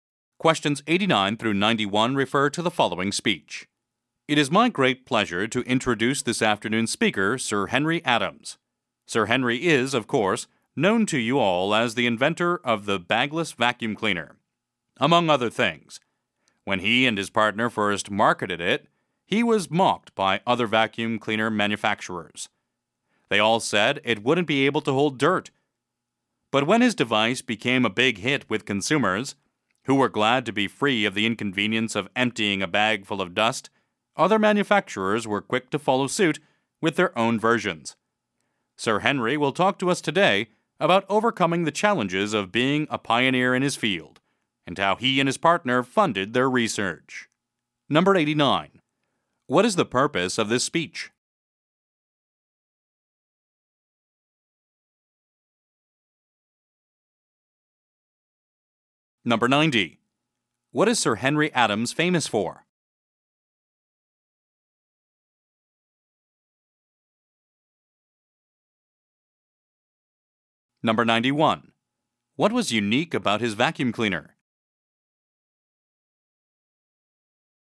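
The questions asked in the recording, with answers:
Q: What is the purpose of this speech?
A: To introduce a speaker

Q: What is Sir Henry Adams famous for?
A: Inventing the bagless vacuum cleaner

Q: What was unique about his vacuum cleaner?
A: It had no bag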